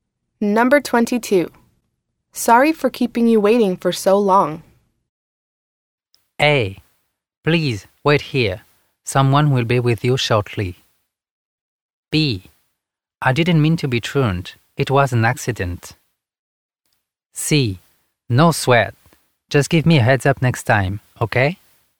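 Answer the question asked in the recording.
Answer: C: No sweat. Just give me a heads up next time, okay?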